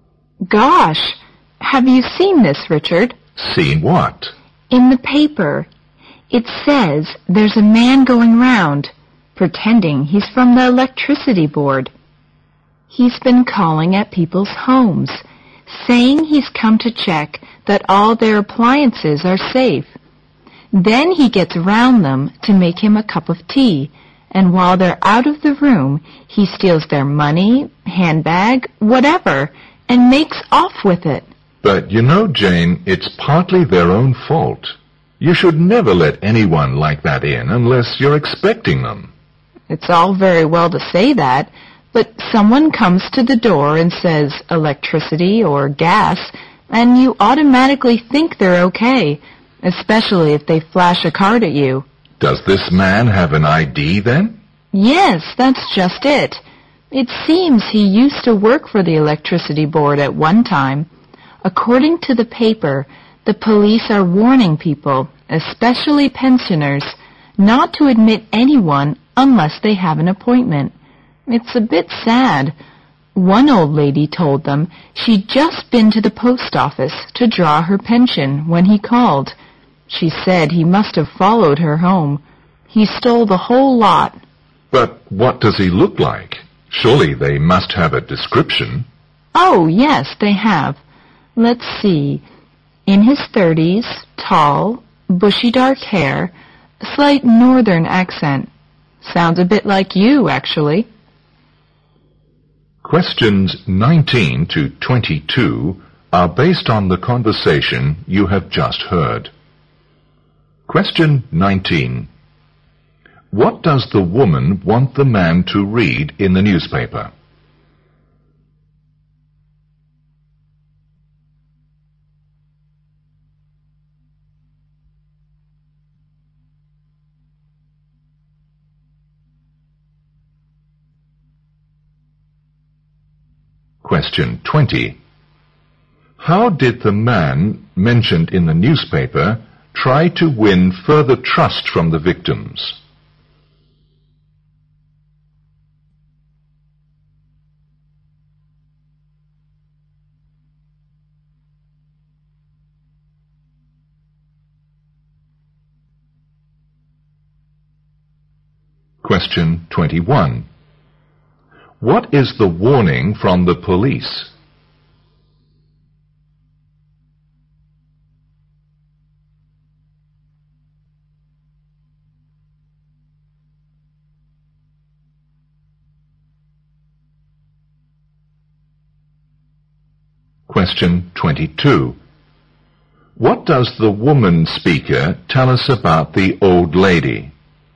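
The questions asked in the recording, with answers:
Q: What does the woman want the man to read in the newspaper?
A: A report about a man pretending to be from the electricity board who steals from people's homes

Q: What is the warning from the police?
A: Not to let anyone in unless they have an appointment

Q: What does the woman speaker tell us about the old lady?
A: The man followed her home from the post office and stole all her pension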